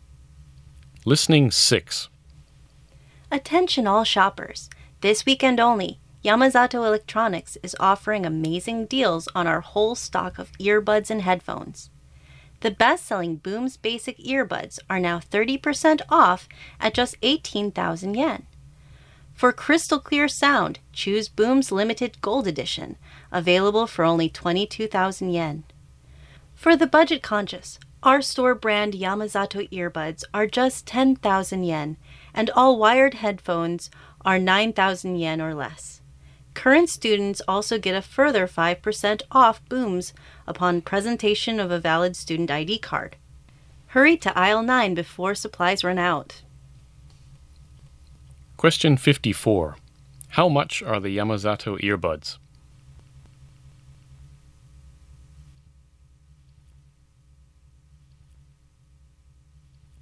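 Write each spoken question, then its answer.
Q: How much are the Yamazato earbuds?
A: 10,000 yen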